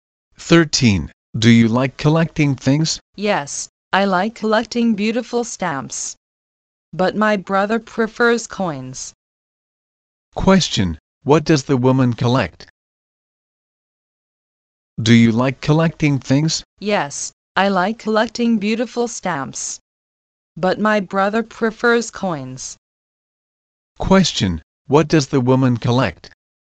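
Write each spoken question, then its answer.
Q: Question, what does the woman collect?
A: Stamps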